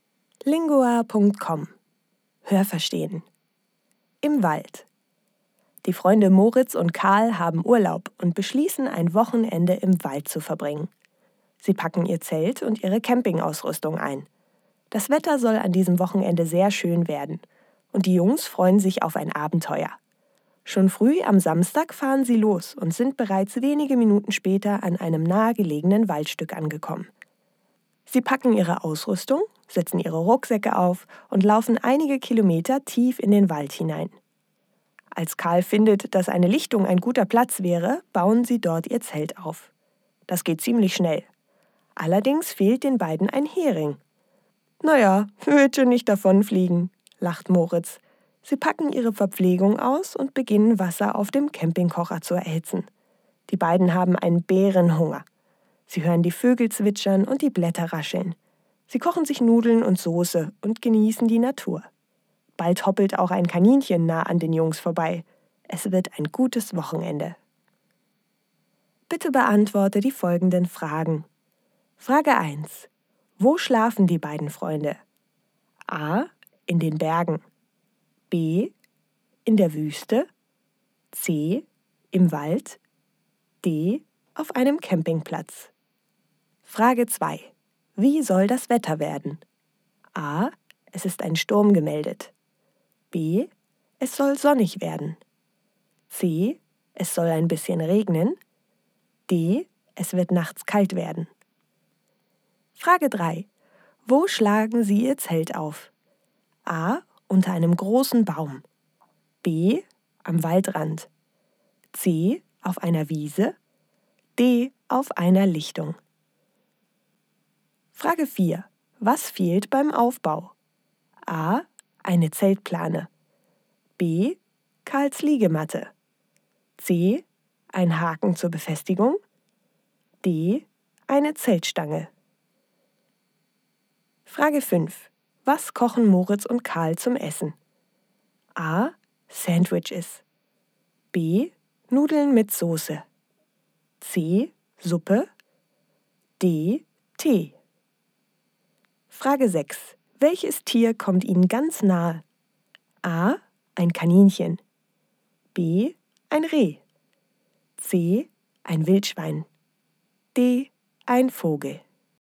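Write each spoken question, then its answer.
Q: Wo schlafen die beiden Freunde?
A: C: Im Wald.

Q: Wie soll das Wetter werden?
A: B: Es soll sonnig werden.

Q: Wo schlagen Sie Ihr Zelt auf?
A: D: Auf einer Lichtung.

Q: Was fehlt beim Aufbau?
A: C: Ein Haken zur Befestigung.

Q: Was kochen Moritz und Karl zum Essen?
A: B: Nudeln mit Soße.

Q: Welches Tier kommt Ihnen ganz nahe?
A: A: Ein Kaninchen.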